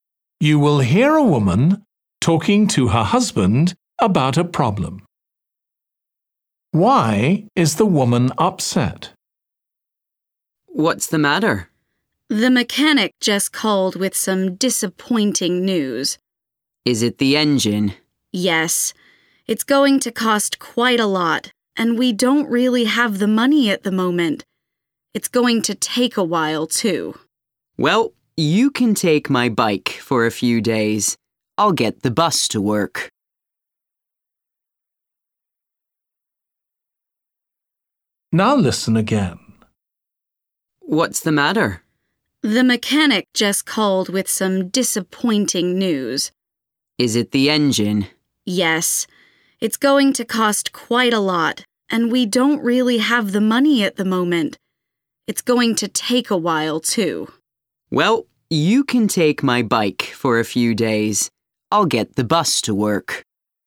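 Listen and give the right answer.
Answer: The car repair will be expensive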